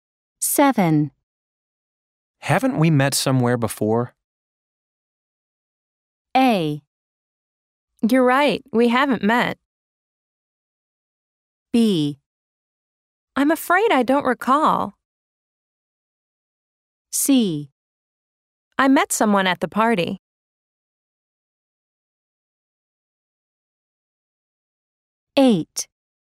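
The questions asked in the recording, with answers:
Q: Haven't we met somewhere before?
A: B: I'm afraid I don't recall.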